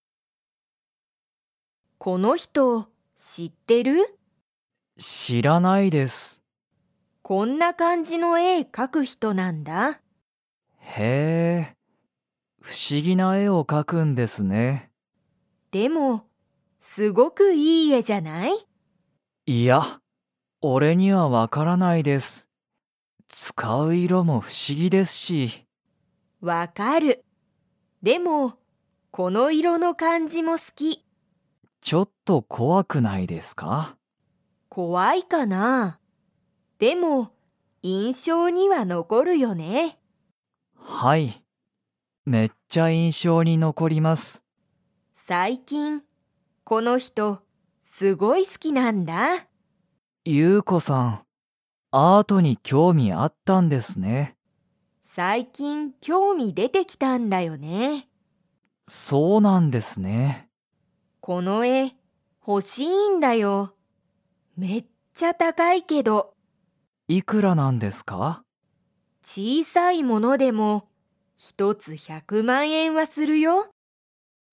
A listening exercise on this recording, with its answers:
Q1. ナオキは、ユウコが好すきな絵えを と思おもっている。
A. かわいい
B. 欲ほしい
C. 新あたらしい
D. 怖こわい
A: D. 怖こわい

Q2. ユウコは、ずっと前まえからアートに興味きょうみがありますか?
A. はい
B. いいえ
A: B. いいえ

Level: Level 3

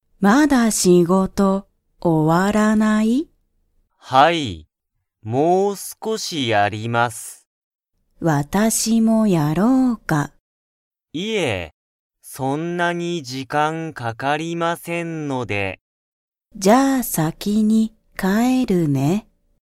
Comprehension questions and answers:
Comprehension Quiz (Skip if you don't understand the conversation yet)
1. 高橋(たかはし)さんは、仕事(しごと)が終(お)わりましたか?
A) はい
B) いいえ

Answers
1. B) いいえ

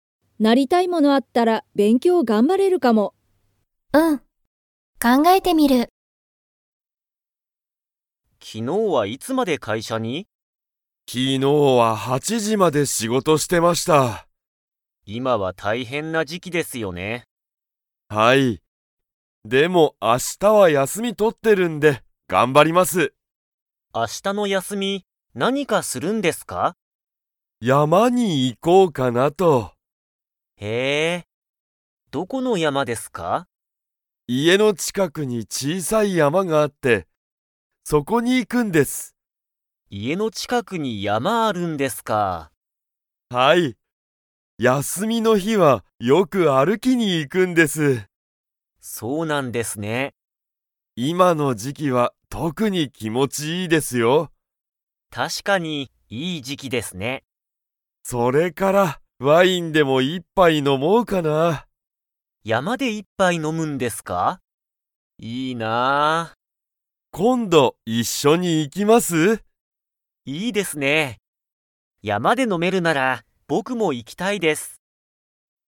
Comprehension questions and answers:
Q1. 高橋(たかはし)さんは、明日(あした)も仕事(しごと)ですか?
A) はい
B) いいえ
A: B) いいえ

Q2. 今(いま)の時期(じき)、山(やま)は特(とく)に____。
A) 小(ちい)さい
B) 一緒(いっしょ)だ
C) 気持(きも)ちいい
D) 大変(たいへん)だ))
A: C) 気持(きも)ちいい

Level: Level 2

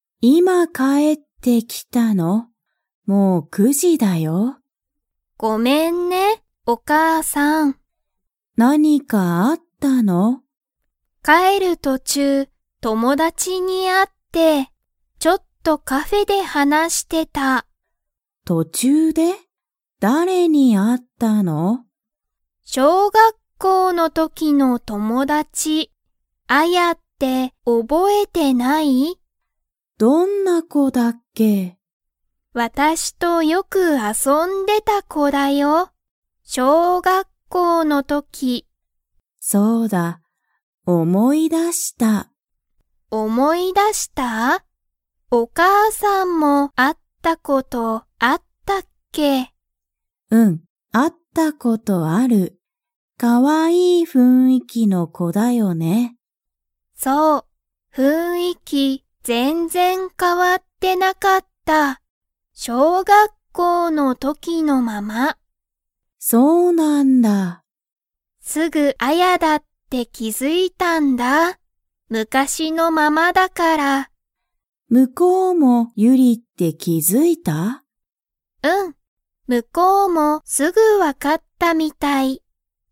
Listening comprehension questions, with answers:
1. ユリは、どこで友達ともだちと話はなしましたか?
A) カフェ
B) 小学校しょうがっこう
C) アヤの家いえ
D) カラオケ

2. アヤは、小学校しょうがっこうの頃ころから雰囲気ふんいきが 。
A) 変かわってた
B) 変かわってなかった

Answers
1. A) カフェ
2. B) 変かわってなかった

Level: Level 3

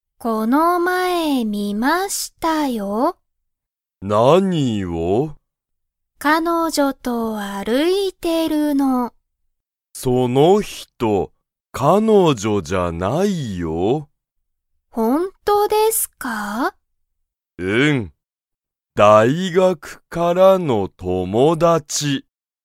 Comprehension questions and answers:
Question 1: その人(ひと)は、先生(せんせい)の彼女(かのじょ)ですか?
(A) はい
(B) いいえ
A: (B) いいえ

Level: Level 1

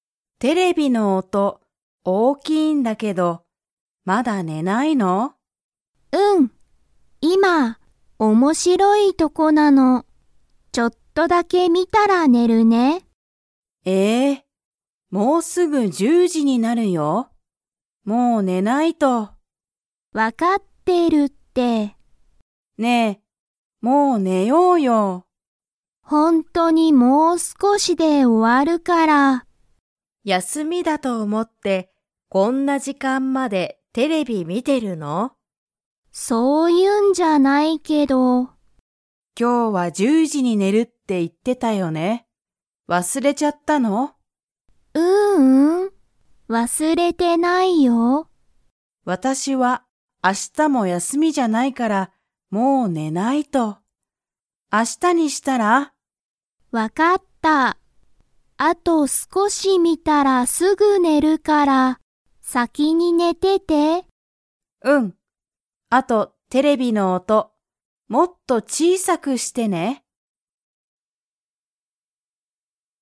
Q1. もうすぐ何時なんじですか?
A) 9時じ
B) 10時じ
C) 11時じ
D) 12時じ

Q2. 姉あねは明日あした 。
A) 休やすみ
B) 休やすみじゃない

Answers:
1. B) 10時じ
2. B) 休やすみじゃない

